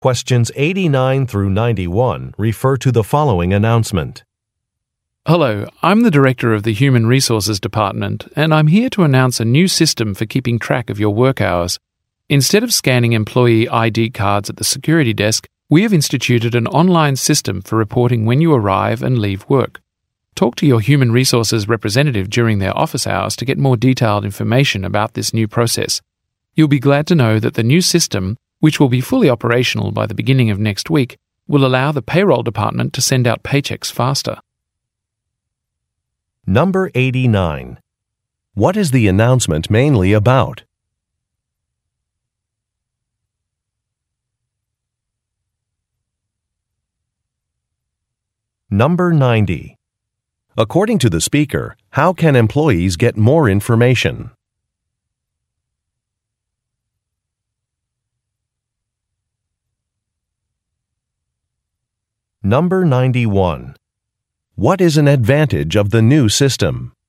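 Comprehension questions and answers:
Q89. What is the announcement mainly about?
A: Reporting work hours

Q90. According to the speaker, how can employees get more information?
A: By speaking with a representative

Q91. What is an advantage of the new system?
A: Staff will be paid more quickly.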